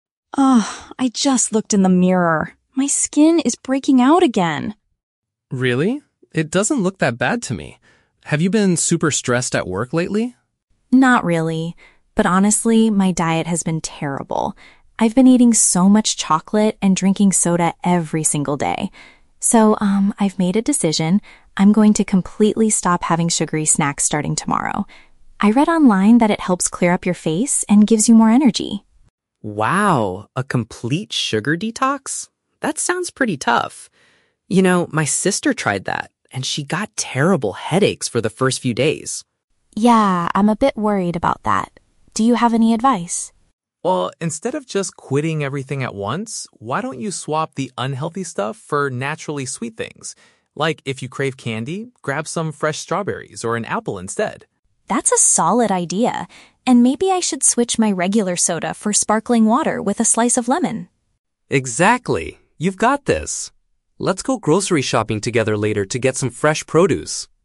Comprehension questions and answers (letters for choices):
Listen to a conversation between two friends. For each question, choose the correct answer (A, B, or C).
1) Why is Emma deciding to change her eating habits?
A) To lose weight before an upcoming social event.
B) To improve the appearance of her complexion.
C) To reduce the amount of stress she feels at work.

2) What negative effect does Liam warn Emma she might experience at first?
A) She could suffer from physical pain in her head.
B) She will probably feel extremely exhausted all day.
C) She might spend a lot of money on expensive fruits.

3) What is Liam's main piece of advice for Emma?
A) To completely eliminate all types of sweet food immediately.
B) To stop drinking all liquids except for plain, still water.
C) To replace junk food with healthier sweet alternatives.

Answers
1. B
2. A
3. C

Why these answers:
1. Emma says her "skin is breaking out" and she wants to "clear up your face," which means improving the appearance of her complexion. Option (A) is not mentioned. Option (C) is a trap; Liam asks if she has been "stressed at work," but Emma explicitly replies, "Not really."
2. Liam mentions that his sister tried a sugar detox and "got terrible headaches," which means physical pain in her head. Option (B) is a trap; Emma mentions wanting "more energy," but Liam does not say she will feel exhausted. Option (C) is not mentioned in the audio.
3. Liam tells Emma to "swap the unhealthy stuff for naturally sweet things" like strawberries or apples (healthier sweet alternatives). Option (A) is a trap; this is what Emma wants to do ("completely stop"), but Liam advises against it ("instead of just quitting everything at once"). Option (B) is a trap; Emma suggests drinking "sparkling water with a slice of lemon," not just plain water.

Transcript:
Emma: Ugh, I just looked in the mirror. My skin is breaking out again.
Liam: Really? It doesn't look that bad to me. Have you been super stressed at work lately?
Emma: Not really. But honestly, my diet has been terrible. I've been eating so much chocolate and drinking soda every single day. So, um, I've made a decision. I'm going to completely stop having sugary snacks starting tomorrow. I read online that it helps clear up your face and gives you more energy.
Liam: Wow, a complete sugar detox? That sounds pretty tough. You know, my sister tried that, and she got terrible headaches for the first few days.
Emma: Yeah, I'm a bit worried about that. Do you have any advice?
Liam: Well, instead of just quitting everything at once, why don't you swap the unhealthy stuff for naturally sweet things? Like, if you crave candy, grab some fresh strawberries or an apple instead.
Emma: That's a solid idea. And maybe I should switch my regular soda for sparkling water with a slice of lemon.
Liam: Exactly! You've got this. Let's go grocery shopping together later to get some fresh produce.